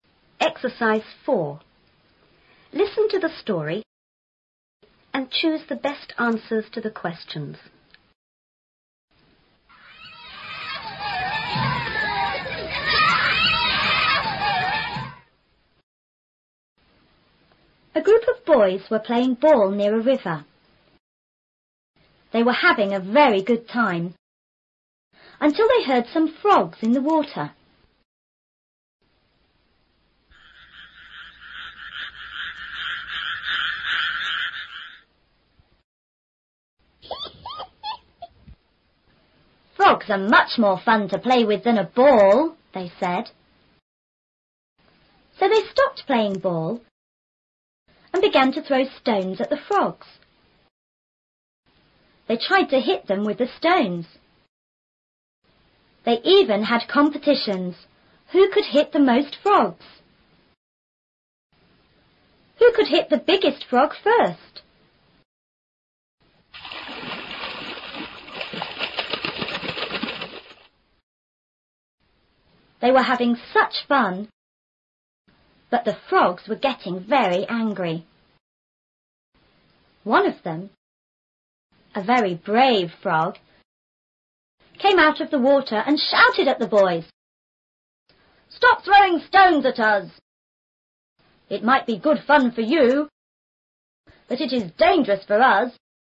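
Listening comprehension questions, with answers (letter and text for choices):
and choose the best answers to the questions.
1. What were the boys doing in the beginning?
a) They were playing with the frogs.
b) They were collecting stones.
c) They were playing ball.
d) They were looking for frogs.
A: c) They were playing ball.

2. What did the boys throw?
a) Water.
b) Balls.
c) Frogs.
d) Stones.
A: d) Stones.

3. How did the frogs feel?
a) Surprised.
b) Afraid.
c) Angry.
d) Excited.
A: c) Angry.

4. What did one of the frogs tell the boys to do?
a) Stop playing near the river.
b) Stop throwing stones at them.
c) Frogs are dangerous.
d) Good fun is dangerous.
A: b) Stop throwing stones at them.

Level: 初中英语广州版4B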